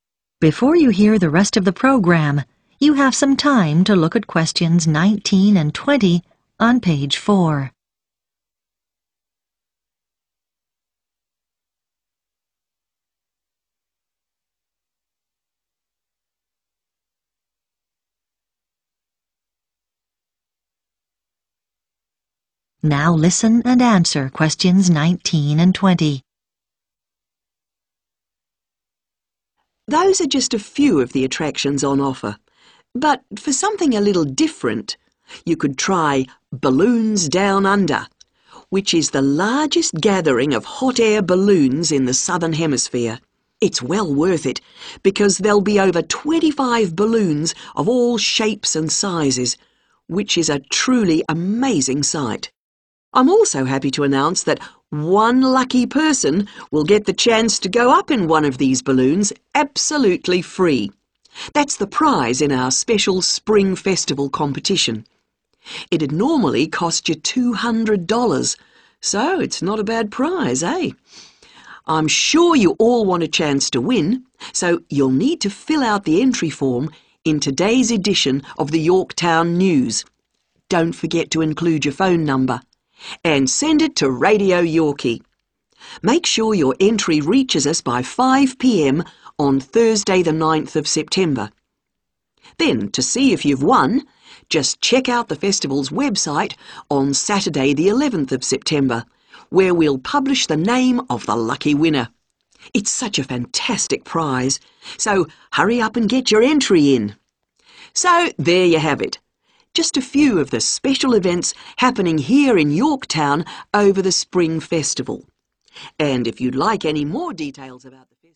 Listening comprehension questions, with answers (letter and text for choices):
Choose the correct letter, A, B or C.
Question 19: In the Spring Festival competition, you can win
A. a family pass to 'Balloons Down Under'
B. a cheque for $200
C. a flight in a hot air balloon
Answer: C. a flight in a hot air balloon

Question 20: You can get an entry form for the competition from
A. the radio station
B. the newspaper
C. the Festival's website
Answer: B. the newspaper